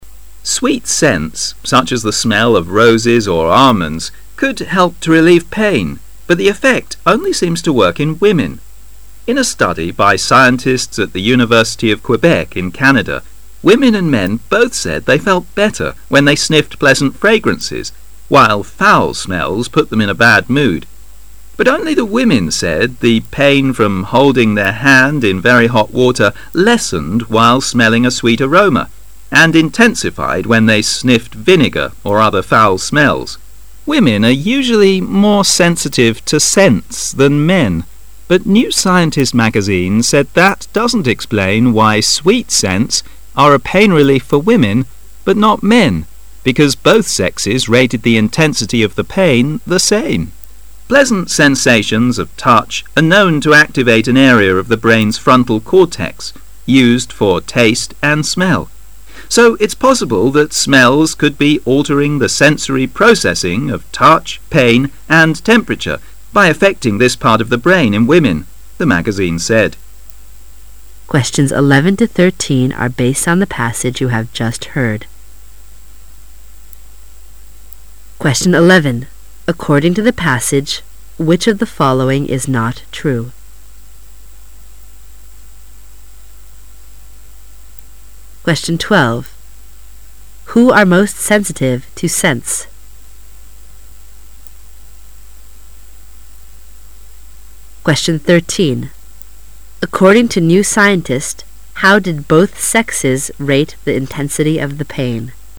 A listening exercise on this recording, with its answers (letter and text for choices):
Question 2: Who are most sensitive to scents?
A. Women.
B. Men.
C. The old.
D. Children.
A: A. Women.

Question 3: According to New Scientist, how did both sexes rate the intensity of the pain?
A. The same.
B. Similar.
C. Women felt stronger.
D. Men felt stronger.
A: A. The same.

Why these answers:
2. 题目问的是:谁对味道更敏感?文章第三句提到:women are usually more sensitive to scents than men"女人通常比男人对气味更敏感一些"。由此可知[A]"女人"是正确的。
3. 题目问的是:据《新科学家》,两性如何划分对疼的强度的等级? 文章倒数第三句提到:but New Scientist magazine said... because both sexes rated the intensity of the pain the same"但《新科学家》说...因为两性对疼的强度的等级划分是同样的"。由此可知[A]"同样的"是正确的。

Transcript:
[解析] 11-13 Sweet scents, such as the smell of roses or almonds, could help to relieve pain, but the effect only seems to work in women. In a study by scientists at the University of Quebec in Canada, women and men both said they felt better when they sniffed pleasant fragrances while foul smells put them in a bad mood. But only the women said the pain from holding their hand in very hot water lessened while smelling a sweet aroma and intensified When they sniffed vinegar or other foul smells. Women are usually more sensitive to scents than men but New Scientist magazine said that doesn't explain why sweet scents are a pain relief for women but not men, because both sexes rated the intensity of the pain the same. "Pleasant sensations of touch are known to activate an area of the brain's frontal cortex used for taste and smell. So it's possible that smells could be altering the sensory processing of touch, pain and temperature by affecting this part of the brain in women, "the magazine said. 11.According to the passage, which of the following is NOT true?